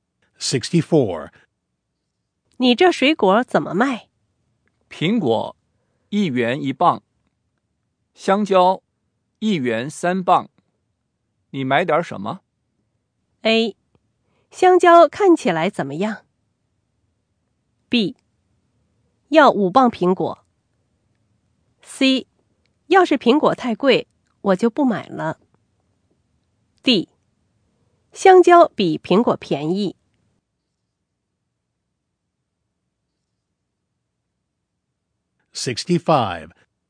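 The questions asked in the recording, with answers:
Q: 苹果1元1磅,香蕉1元3磅。你买点什么?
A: B: 要5磅苹果。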